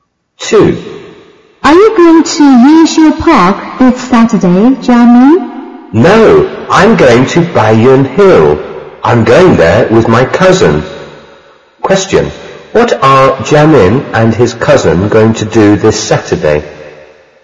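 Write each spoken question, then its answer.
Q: What are Jamin and his cousin going to do this Saturday?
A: Go to Baiyun Hill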